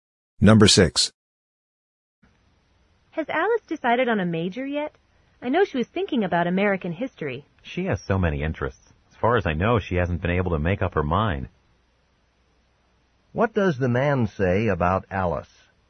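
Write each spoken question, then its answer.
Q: What does the man say about Alice?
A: She hasn't decided on a major yet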